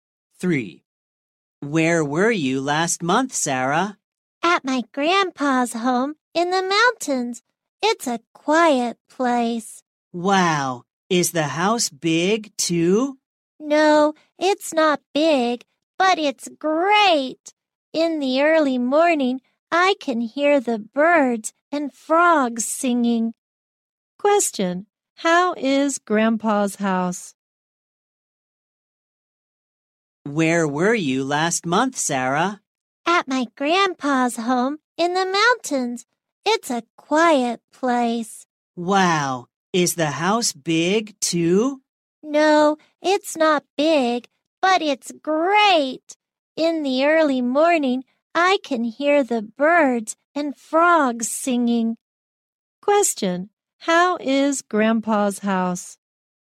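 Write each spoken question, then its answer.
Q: Question, how is Grandpa's house?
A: Quiet and not big, in the mountains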